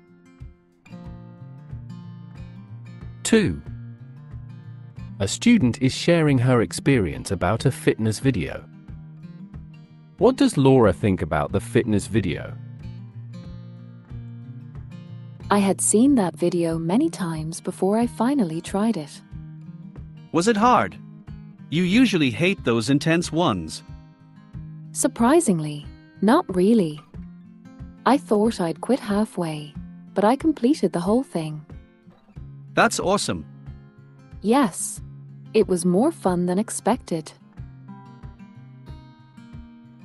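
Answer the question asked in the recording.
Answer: It was more fun and less hard than she expected.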